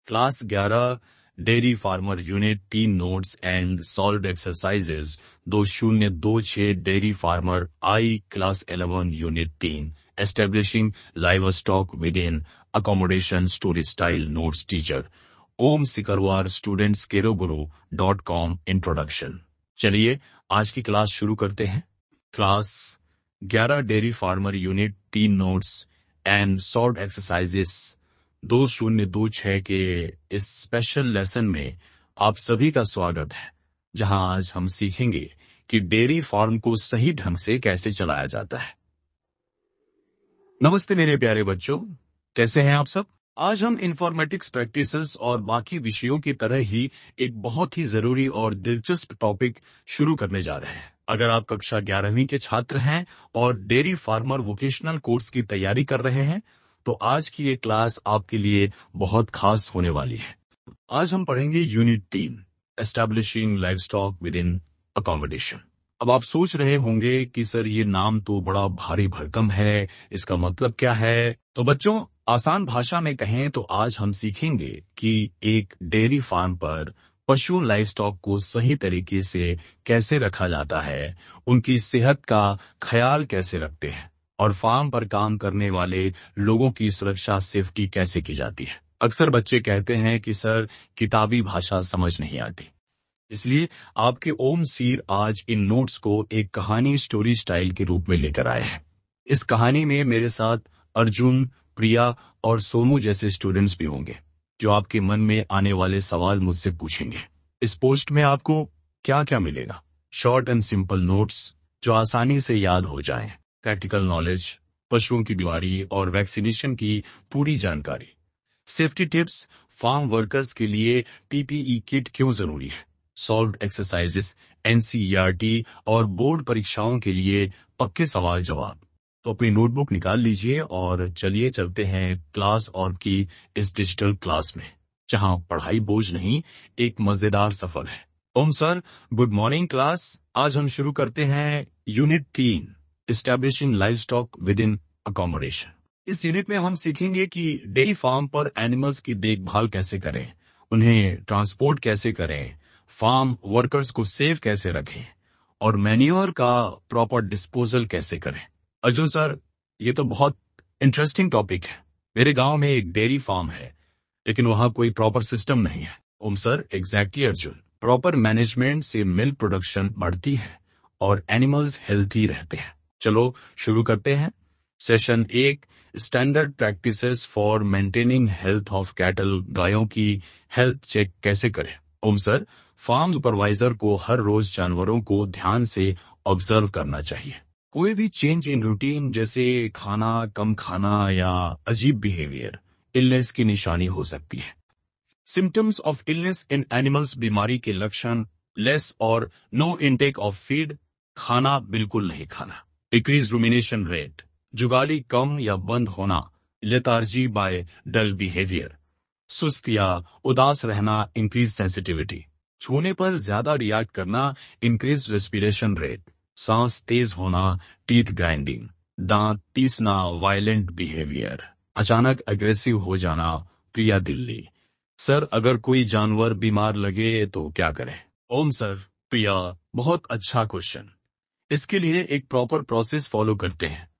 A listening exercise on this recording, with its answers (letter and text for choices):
Primary symptoms of illness in cattle are:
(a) Lethargy, dull or depressed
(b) Teeth grinding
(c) Decreased rumination rate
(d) All of the above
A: (d) All of the above

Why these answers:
ये सभी illness के primary symptoms हैं।

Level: Class 11